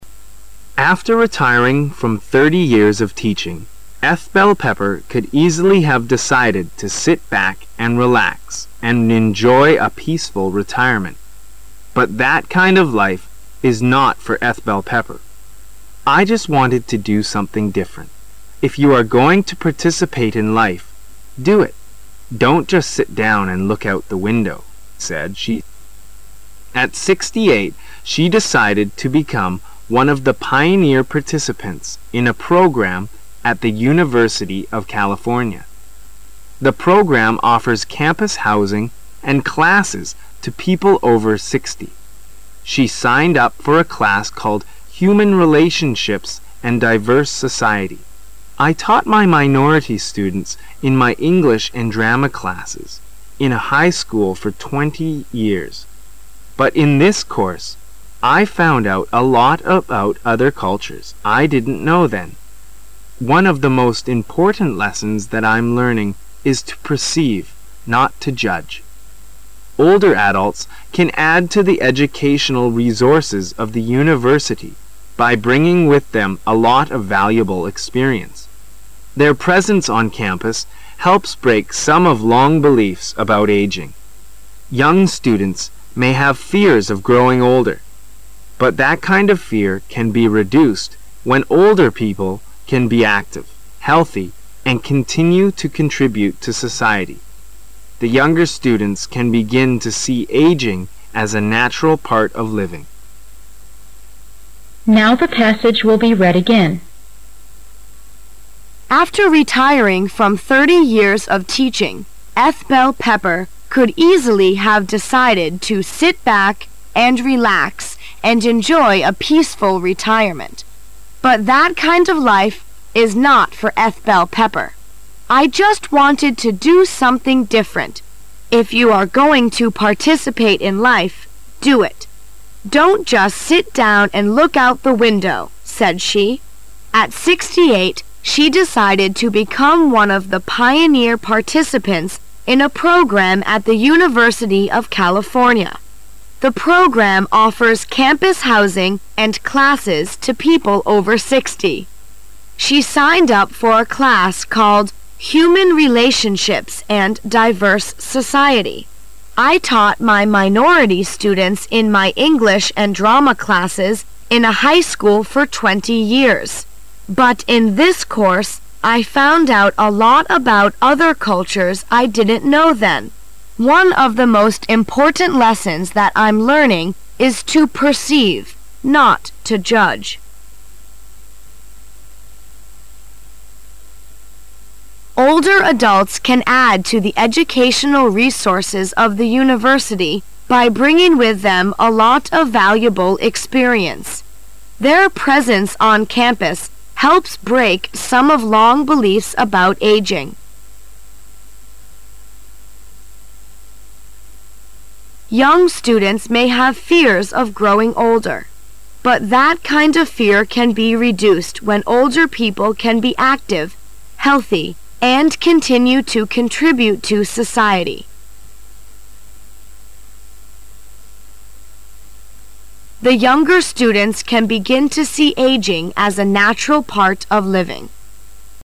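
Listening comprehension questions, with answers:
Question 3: "I just wanted to do something 3 .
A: different

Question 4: If you are going to 4 in life, do it.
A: participate

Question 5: she decided to become one of the 5 participants in a program at the University of California;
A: pioneer

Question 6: The program offers 6 housing and classes to people over sixty.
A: campus

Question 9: I found out a lot about other cultures I didn't know then. 9 .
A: One of the most important lessons that I'm learning is to perceive, not to judge

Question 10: by bringing with them a lot of valuable experience. 10 .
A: Their presence on campus helps break some of long beliefs about aging

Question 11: Young students may have fears of growing older. But 11 .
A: that kind of fear can be reduced when older people can be active, healthy, and continue to contribute to society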